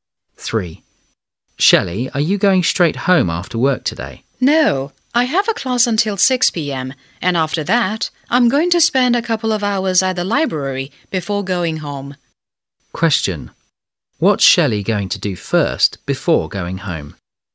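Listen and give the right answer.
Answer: Attend a class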